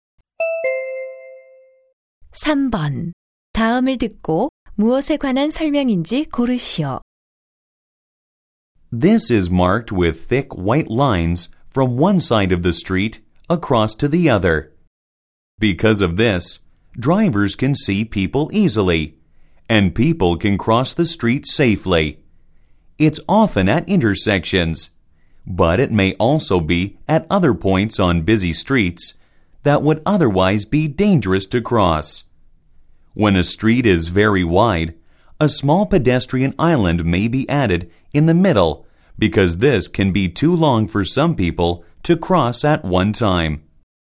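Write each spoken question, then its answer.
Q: 다음을 듣고 무엇에 관한 설명인지 고르시오.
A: 횡단보도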